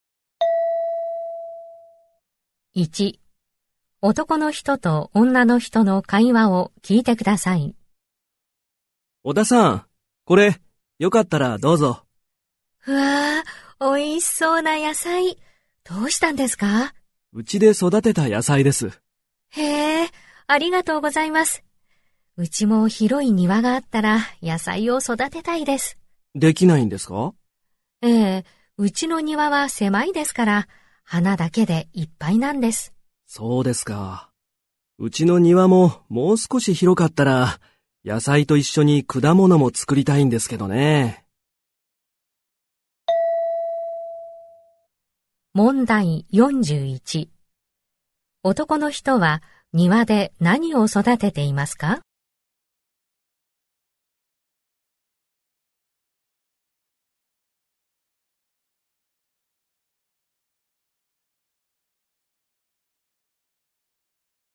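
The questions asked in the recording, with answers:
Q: 男の人は庭で何を育てていますか?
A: 野菜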